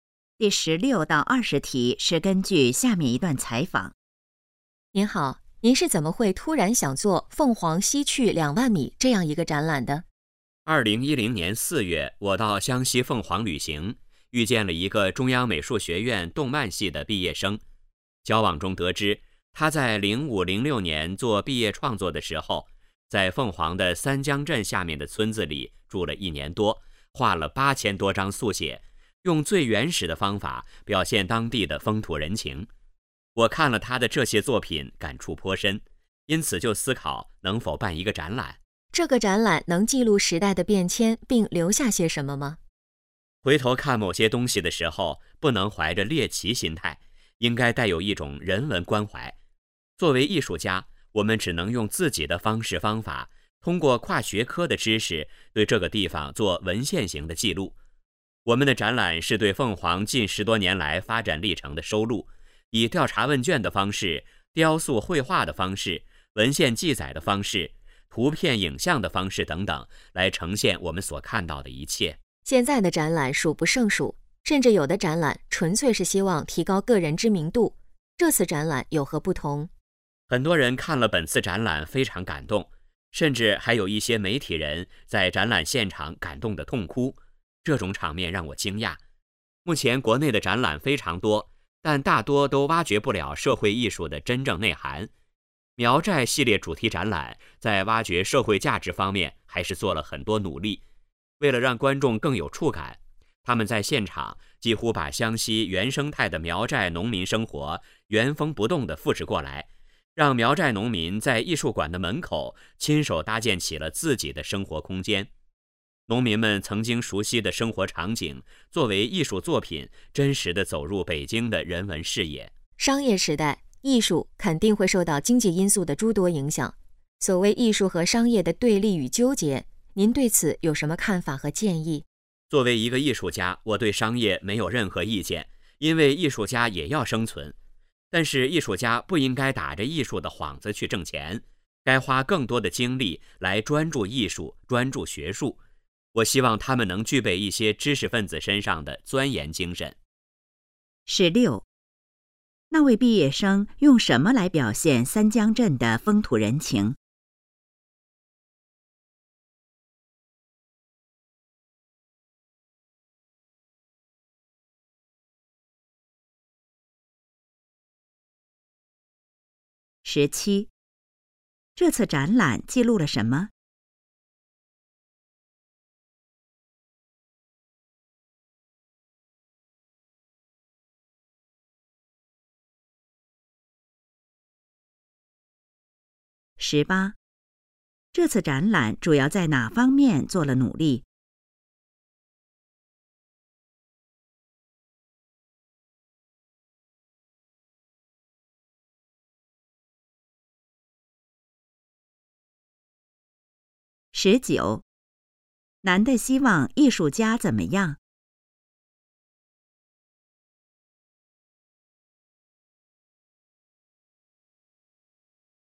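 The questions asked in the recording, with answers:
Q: 那位毕业生用什么来表现三江镇的风土人情?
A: 8000多张速写,用最原始的方法

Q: 这次展览记录了什么?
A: 凤凰近10多年来的发展历程

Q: 这次展览主要在哪方面做了努力?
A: 挖掘社会价值

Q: 男的希望艺术家怎么样?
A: 专注艺术和学术,具备钻研精神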